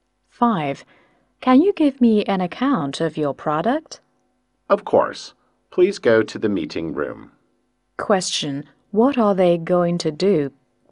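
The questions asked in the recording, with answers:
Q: What are they going to do?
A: Go to the meeting room to talk about the product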